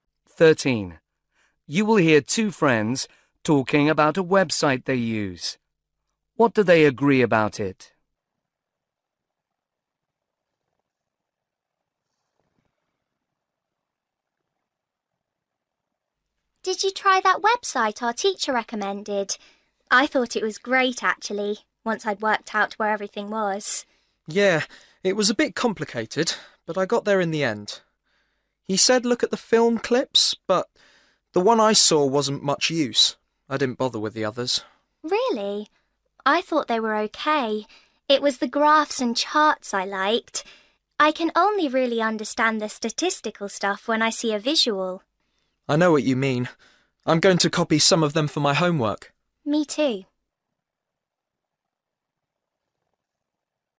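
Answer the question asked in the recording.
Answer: The graphs and charts are useful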